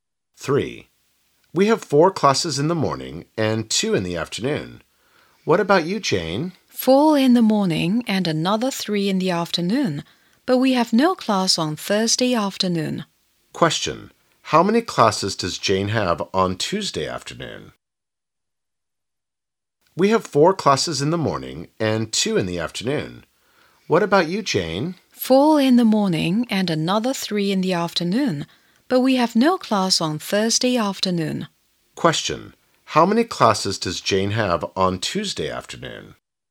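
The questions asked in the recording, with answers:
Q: How many classes does Jane have on Tuesday afternoon?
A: Three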